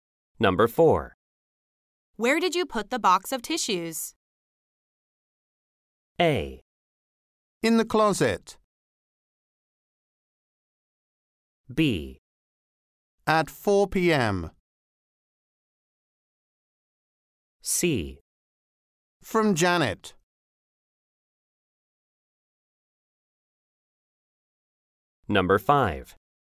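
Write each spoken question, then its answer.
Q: Where did you put the box of tissues?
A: A: In the closet.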